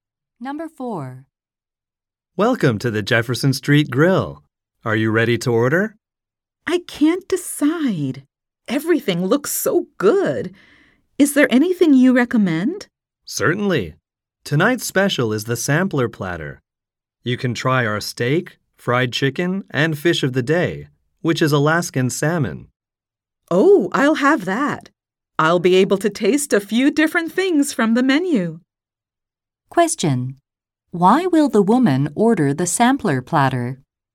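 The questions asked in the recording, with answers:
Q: Why will the woman order the sampler platter?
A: To taste several different dishes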